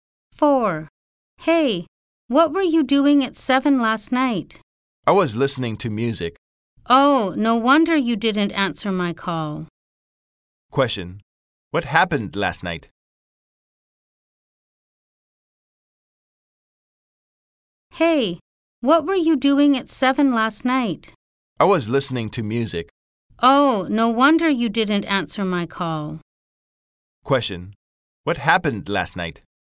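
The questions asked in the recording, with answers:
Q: What happened last night?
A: The boy was listening to music and didn't answer the call.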